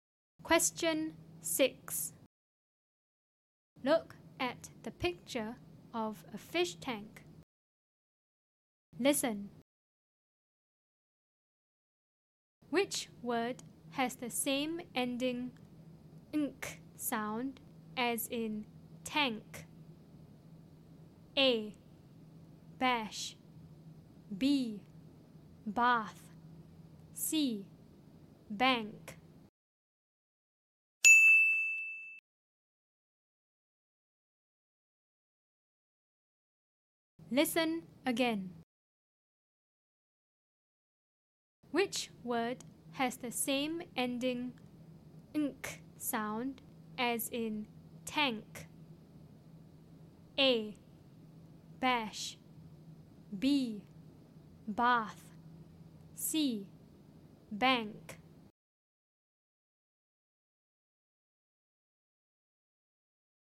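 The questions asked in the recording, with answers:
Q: Which word has the same ending ink sound as in tank?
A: C: Bank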